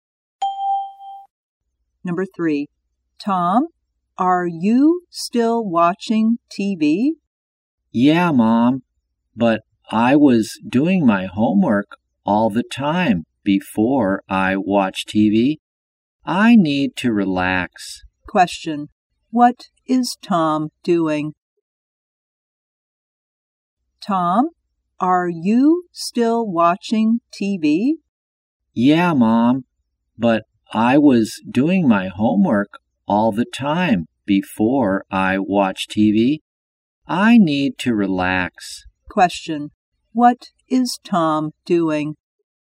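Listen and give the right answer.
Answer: Watching TV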